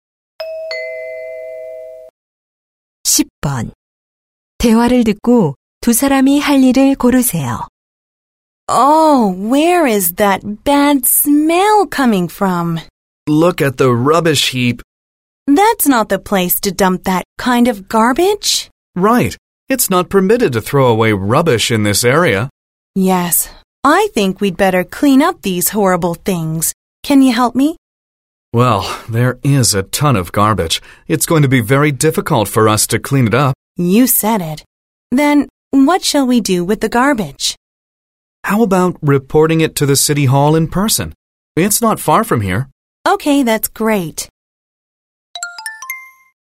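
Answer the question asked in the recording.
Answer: 시청에 직접 가서 쓰레기 신고하기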